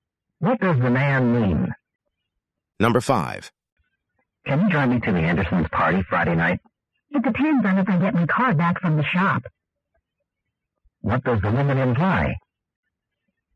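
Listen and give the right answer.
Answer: Her car is being repaired, so she may not be able to drive him.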